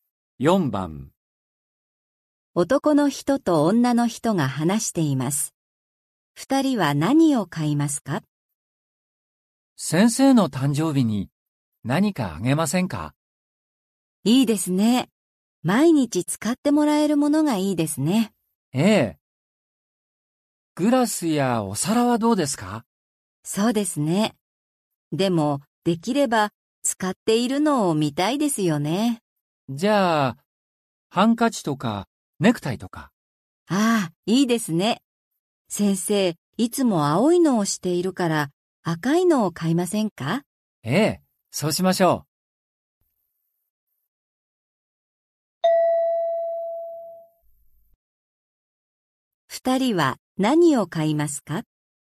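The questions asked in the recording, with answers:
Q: 二人は何を買いますか?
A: 赤いネクタイ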